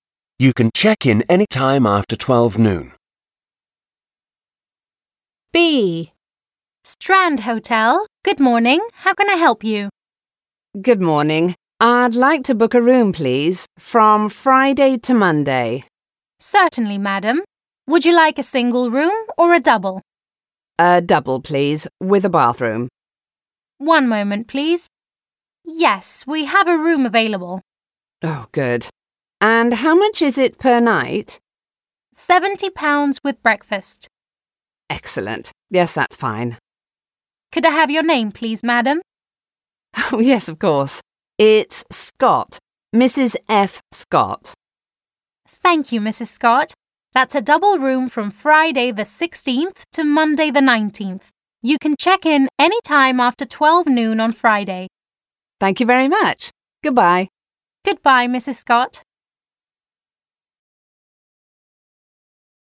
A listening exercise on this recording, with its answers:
3. Read the dialogue and answer the questions. − Прочитайте диалог и ответьте на вопросы.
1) How many days is the reservation for?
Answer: The reservation is for three days.

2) What type of room does she want?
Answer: She wants a double room with a bathroom.

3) How much does the room cost?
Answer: The room costs £70.

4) What does the price include?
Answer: The price includes breakfast.

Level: 6 класс